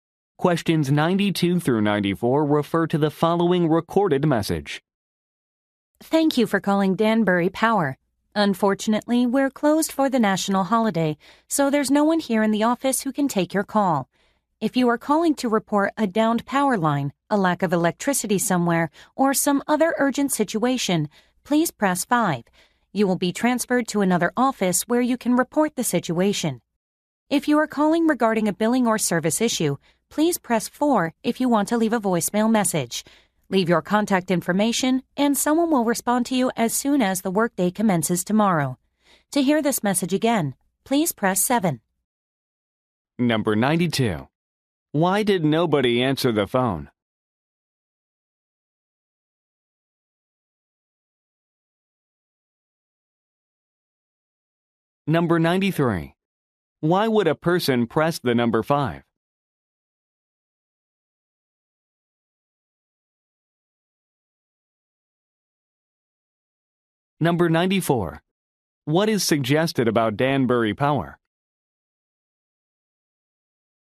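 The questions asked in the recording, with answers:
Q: Why did nobody answer the phone?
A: The office is closed for a national holiday

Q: Why would a person press the number 5?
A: To report an urgent situation like a downed power line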